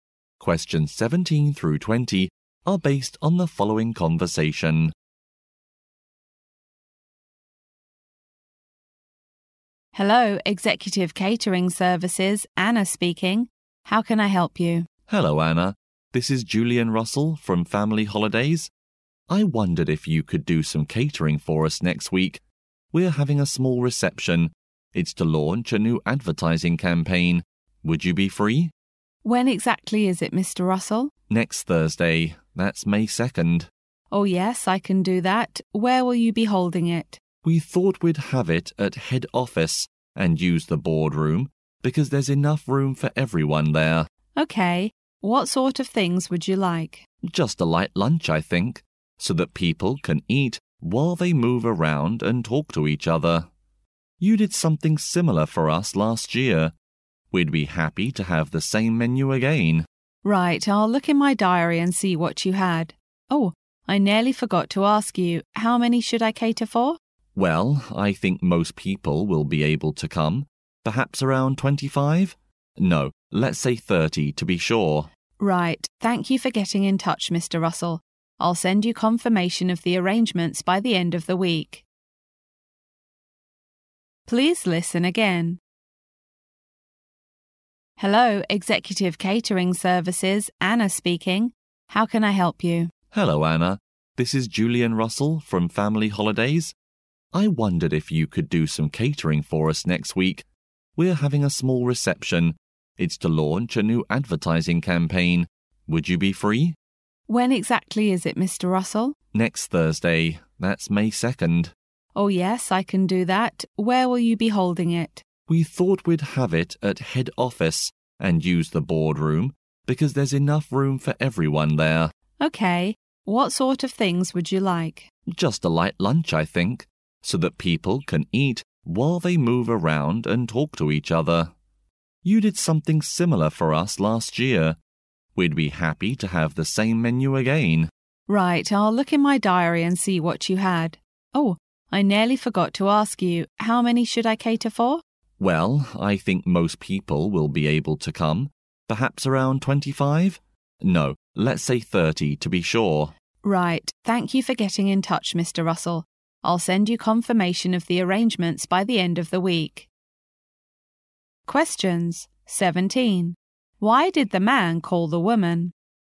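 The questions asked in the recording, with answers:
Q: Why did the man call the woman?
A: To arrange catering for a reception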